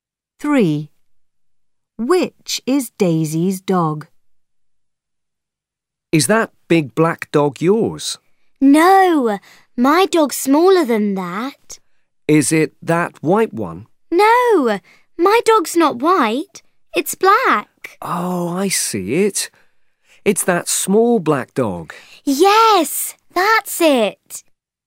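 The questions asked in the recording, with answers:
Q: Which is Daisy's dog?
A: the small black dog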